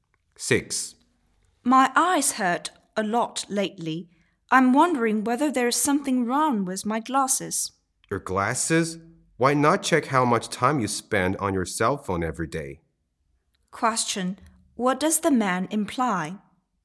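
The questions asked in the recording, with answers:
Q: What does the man imply?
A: The woman spends too much time on her cell phone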